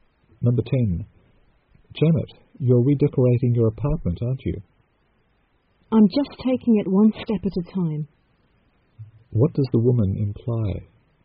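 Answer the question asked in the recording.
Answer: She is redecorating slowly, one step at a time.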